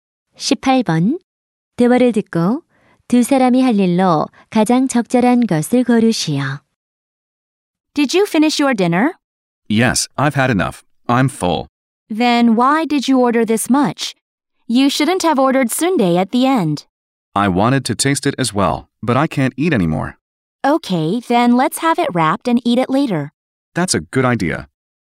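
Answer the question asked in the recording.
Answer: 남은 음식을 포장하기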